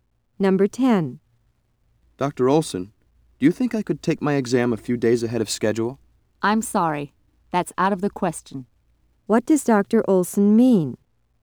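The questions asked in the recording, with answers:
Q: What does Dr. Olson mean?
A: The student cannot take the exam early.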